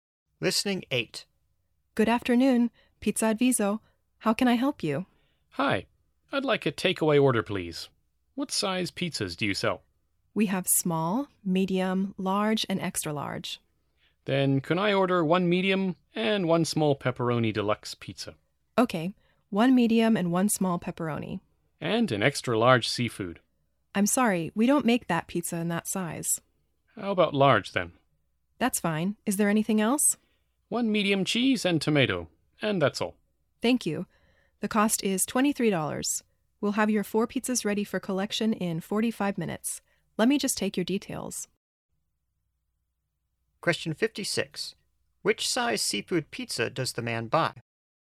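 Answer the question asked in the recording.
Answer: Large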